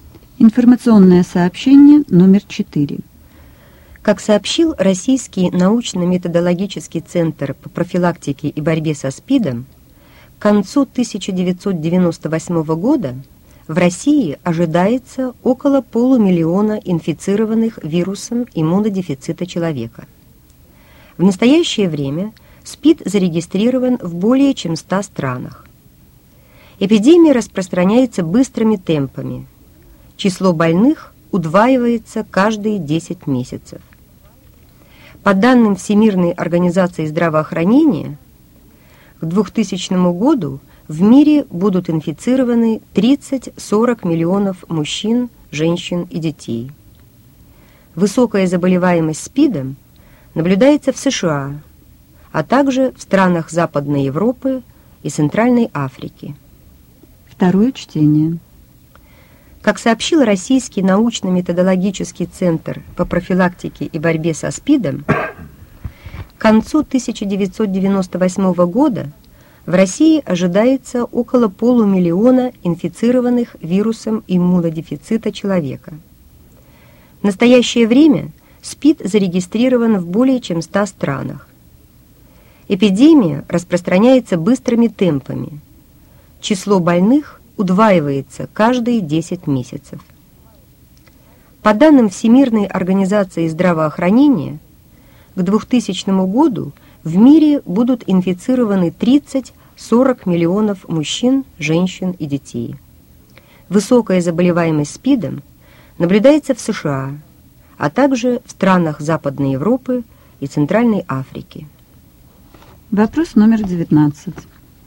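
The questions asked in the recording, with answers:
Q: Сколько инфицированных вирусом иммунодефицита человека будет, по мнению специалистов, в России в 1998 году?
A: Около 500 000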